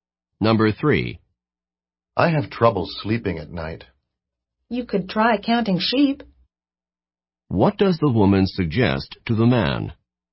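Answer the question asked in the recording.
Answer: That he try counting sheep.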